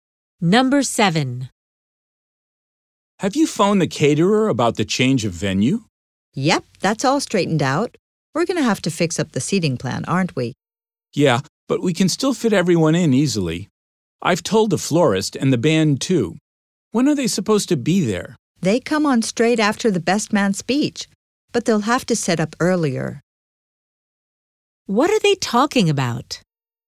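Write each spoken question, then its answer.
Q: What are they talking about?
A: Arrangements for a wedding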